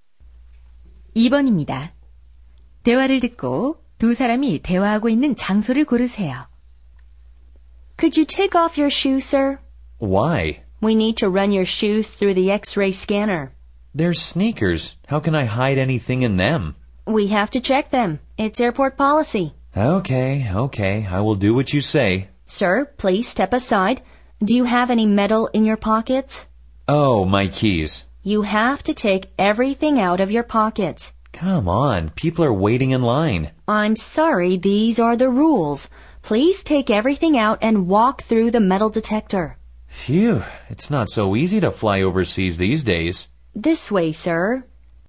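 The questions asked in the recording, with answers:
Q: 대화를 듣고 두 사람이 대화하고 있는 장소를 고르세요.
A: 공항 보안 검색대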